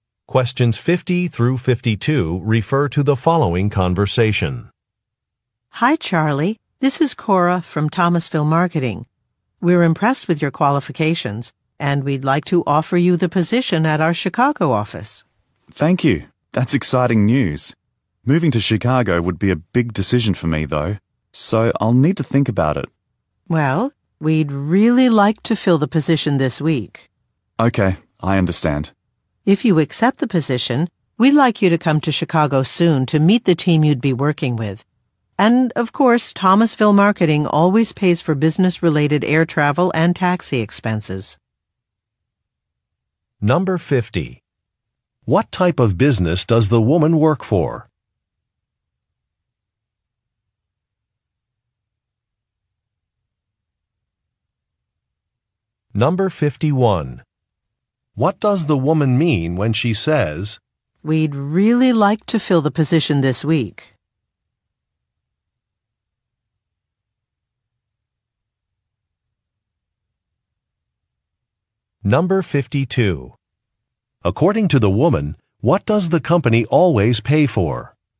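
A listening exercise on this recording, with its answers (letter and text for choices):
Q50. What type of business does the woman work for?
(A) A grocery store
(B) A publishing company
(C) A marketing firm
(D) A travel agency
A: (C) A marketing firm

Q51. What does the woman mean when she says, "we'd really like to fill the position this week"?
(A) A candidate should decide quickly.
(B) An alternative plan needs to be approved.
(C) Additional funding will be required.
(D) A manager will change a timeline.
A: (A) A candidate should decide quickly.

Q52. According to the woman, what does the company always pay for?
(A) Housing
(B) Equipment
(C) Clothing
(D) Transportation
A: (D) Transportation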